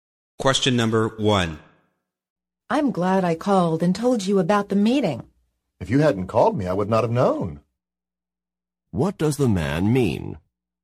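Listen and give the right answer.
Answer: He knew about the meeting because the woman called him.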